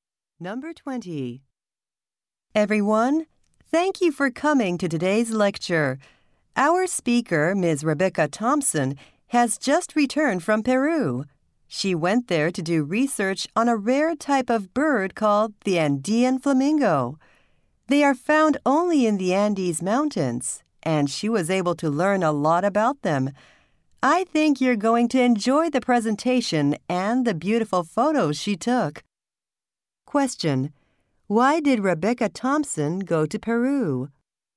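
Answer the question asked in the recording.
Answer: To do research on the Andean flamingo.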